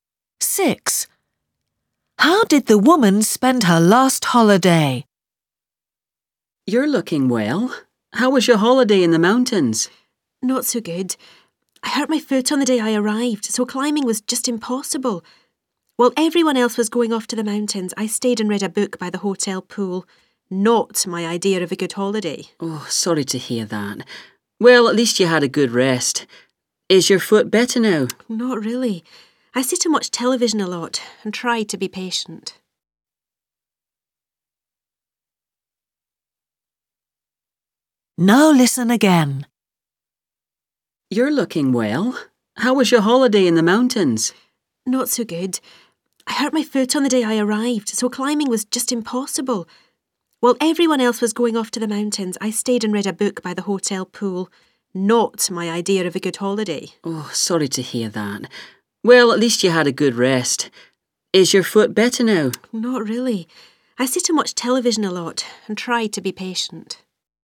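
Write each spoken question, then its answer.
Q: How did the woman spend her last holiday?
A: Reading a book by the hotel pool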